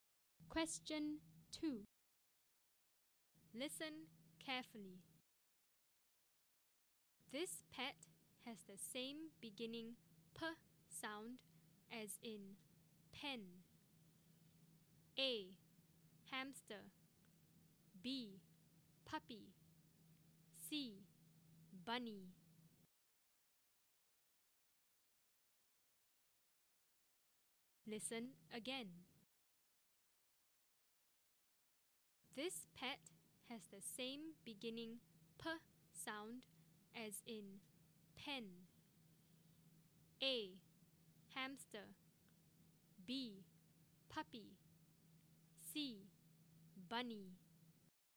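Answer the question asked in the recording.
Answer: B: Puppy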